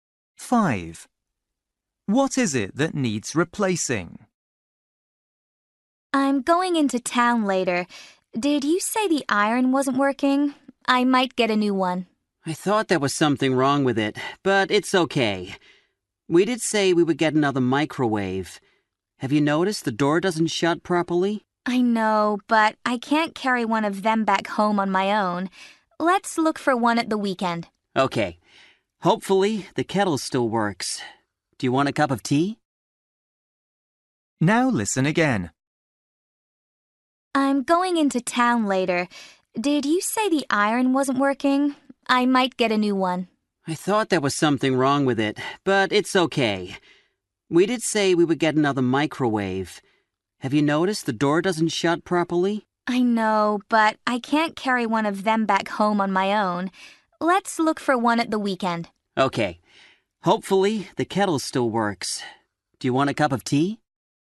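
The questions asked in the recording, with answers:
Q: What is it that needs replacing?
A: The microwave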